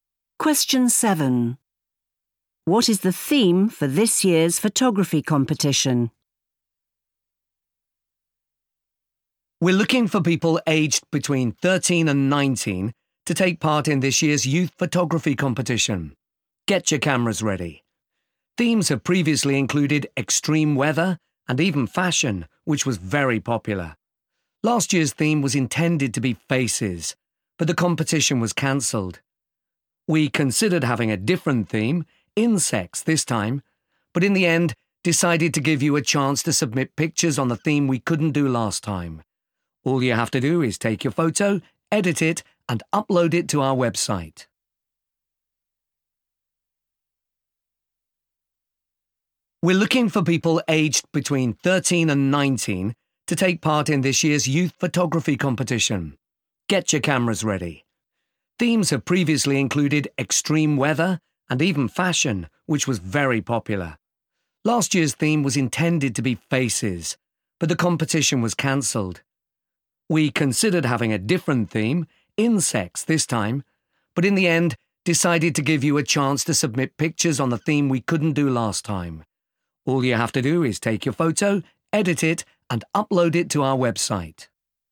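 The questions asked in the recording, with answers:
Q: What is the theme for this year's photography competition?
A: Faces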